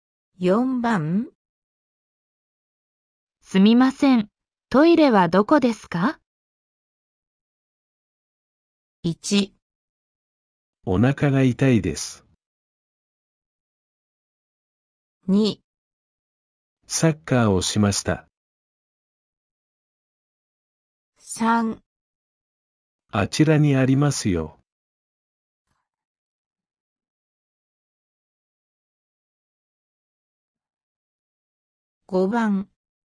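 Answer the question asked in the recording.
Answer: 3

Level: N5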